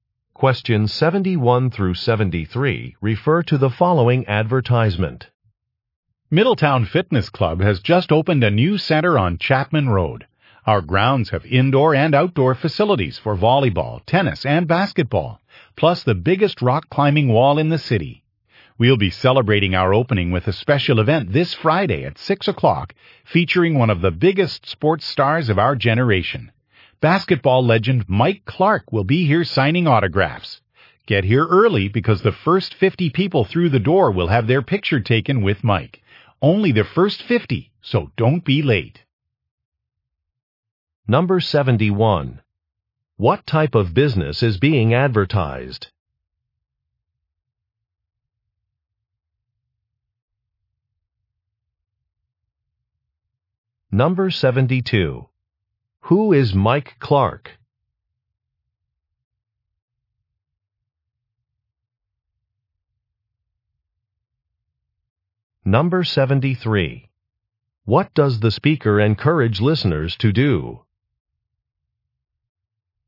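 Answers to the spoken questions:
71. A fitness club
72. A basketball legend (famous athlete)
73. Arrive early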